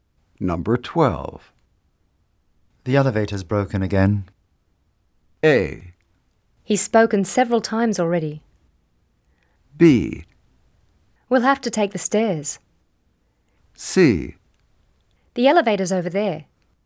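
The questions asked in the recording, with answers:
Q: The elevator's broken again.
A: B: We'll have to take the stairs.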